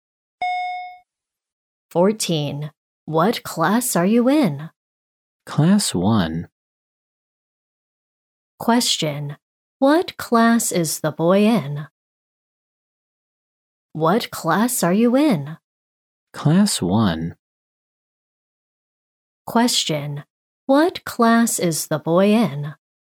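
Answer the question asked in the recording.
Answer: Class 1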